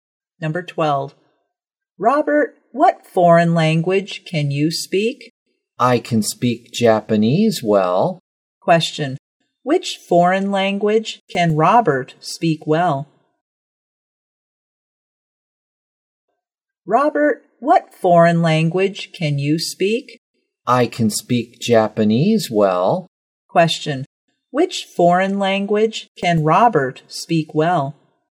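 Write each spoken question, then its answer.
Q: Which foreign language can Robert speak well?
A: Japanese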